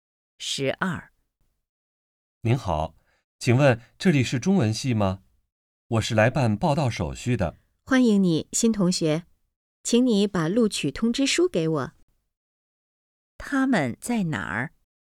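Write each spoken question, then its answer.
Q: 他们在哪儿?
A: 中文系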